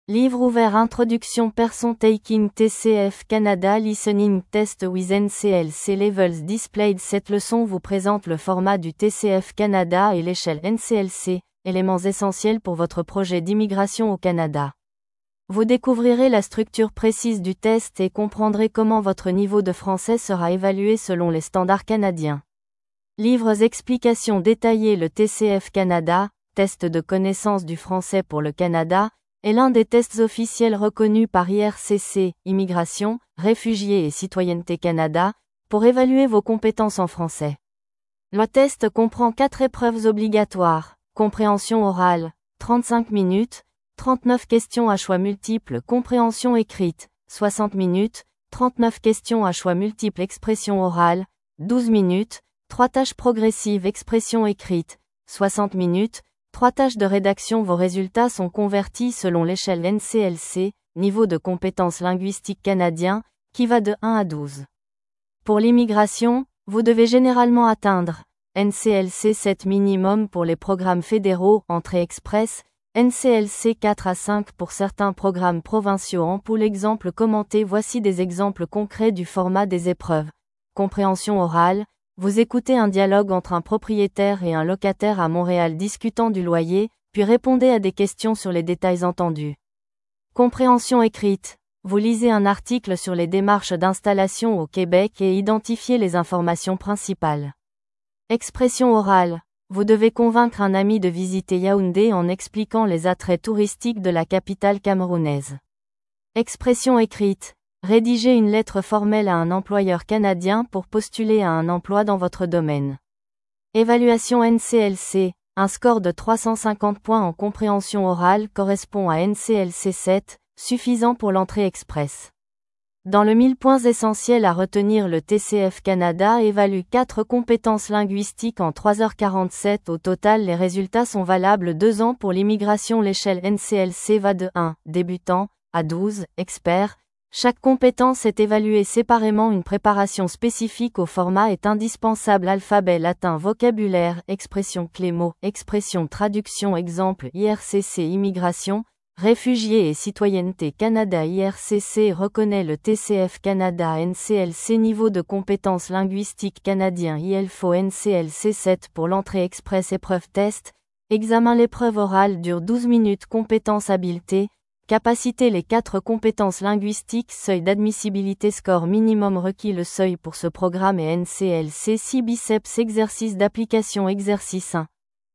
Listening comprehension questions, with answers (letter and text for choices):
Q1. Combien d'épreuves comporte le TCF Canada ?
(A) 3 épreuves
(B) 4 épreuves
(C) 5 épreuves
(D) 6 épreuves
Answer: (B) 4 épreuves

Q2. Quelle est la durée de l'épreuve de compréhension écrite ?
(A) 60 minutes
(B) 35 minutes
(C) 12 minutes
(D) 45 minutes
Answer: (A) 60 minutes

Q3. L'échelle NCLC va de quel niveau à quel niveau ?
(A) 1 à 10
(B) A1 à C2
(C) 1 à 12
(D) 0 à 15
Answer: (C) 1 à 12

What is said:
📖 Introduction
Person taking TCF Canada listening test with NCLC levels displayed
Cette leçon vous présente le format du TCF Canada et l'échelle NCLC, éléments essentiels pour votre projet d'immigration au Canada. Vous découvrirez la structure précise du test et comprendrez comment votre niveau de français sera évalué selon les standards canadiens.
📚 Explications détaillées
Le TCF Canada (Test de Connaissance du Français pour le Canada) est l'un des tests officiels reconnus par IRCC (Immigration, Réfugiés et Citoyenneté Canada) pour évaluer vos compétences en français.
Le test comprend 4 épreuves obligatoires :
Compréhension orale : 35 minutes, 39 questions à choix multiples
Compréhension écrite : 60 minutes, 39 questions à choix multiples
Expression orale : 12 minutes, 3 tâches progressives
Expression écrite : 60 minutes, 3 tâches de rédaction
Vos résultats sont convertis selon l'échelle NCLC (Niveaux de Compétence Linguistique Canadiens) qui va de 1 à 12. Pour l'immigration, vous devez généralement atteindre :
NCLC 7 minimum pour les programmes fédéraux (Entrée express)
NCLC 4 à 5 pour certains programmes provinciaux
Voici des exemples concrets du format des épreuves :
Compréhension orale : Vous écoutez un dialogue entre un propriétaire et un locataire à Montréal discutant du loyer, puis répondez à des questions sur les détails entendus.
Compréhension écrite : Vous lisez un article sur les démarches d'installation au Québec et identifiez les informations principales.
Expression orale : Vous devez convaincre un ami de visiter Yaoundé en expliquant les attraits touristiques de la capitale camerounaise.
Expression écrite : Rédiger une lettre formelle à un employeur canadien pour postuler à un emploi dans votre domaine.
Évaluation NCLC : Un score de 350 points en compréhension orale correspond à NCLC 7, suffisant pour l'Entrée express.
🎯 Points essentiels à retenir
Le TCF Canada évalue 4 compétences linguistiques en 3h47 au total
Les résultats sont valables 2 ans pour l'immigration
L'échelle NCLC va de 1 (débutant) à 12 (expert)
Chaque compétence est évaluée séparément
Une préparation spécifique au format est indispensable
Traduction
Exemple
IRCC
IRCC reconnaît le TCF Canada
NCLC
Niveaux de Compétence Linguistique Canadiens
Il faut NCLC 7 pour l'Entrée express
Épreuve
Test, examen
L'épreuve orale dure 12 minutes
Compétence
Habileté, capacité
Le seuil pour ce programme est NCLC 6